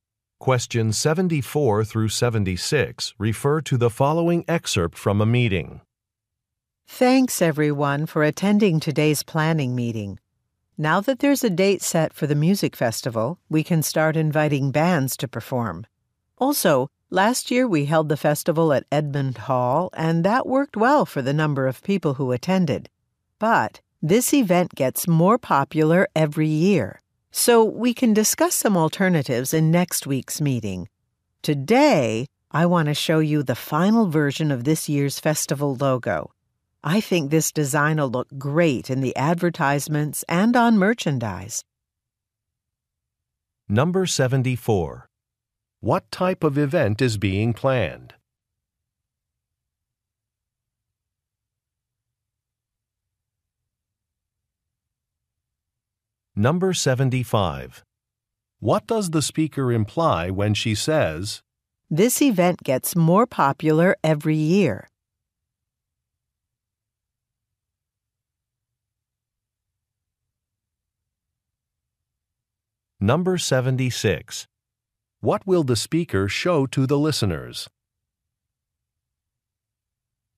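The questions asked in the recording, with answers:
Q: What type of event is being planned?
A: A music festival

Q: What will the speaker show to the listeners?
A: The final version of the festival logo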